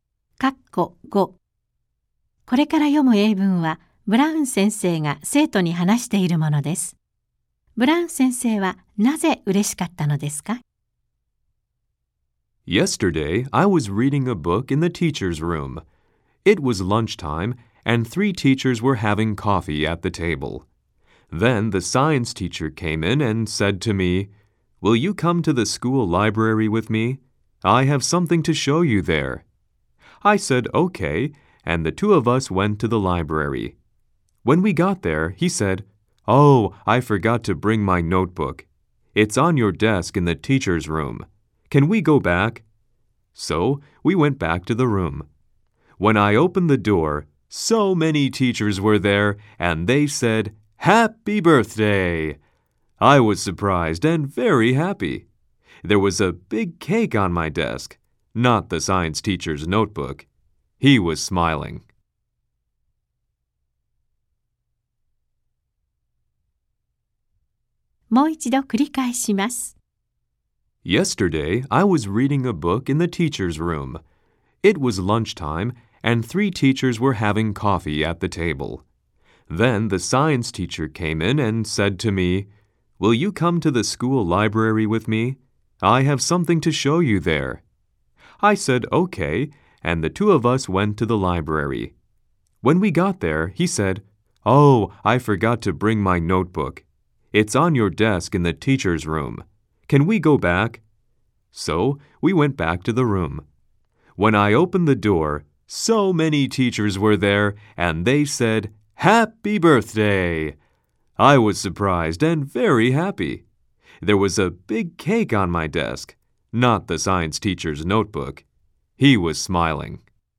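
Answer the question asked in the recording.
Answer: 先生たちが誕生日を祝ってくれたから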